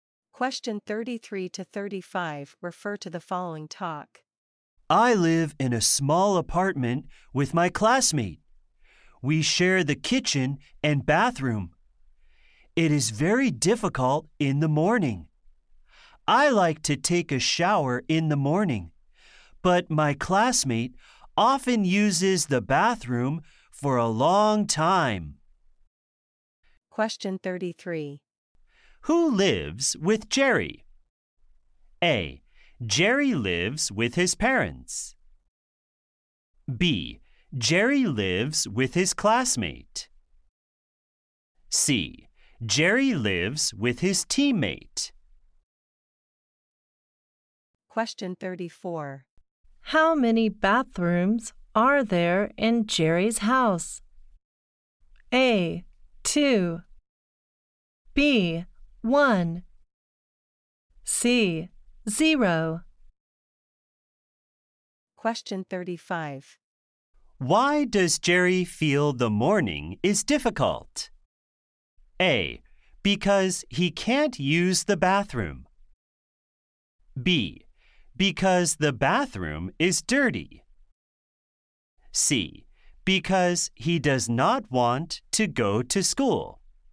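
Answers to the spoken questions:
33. B: Jerry lives with his classmate.
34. B: 1.
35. A: Because he can't use the bathroom.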